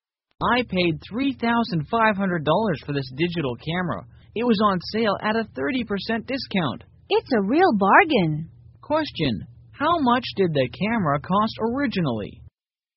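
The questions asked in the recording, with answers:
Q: Question, how much did the camera cost originally?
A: $5,000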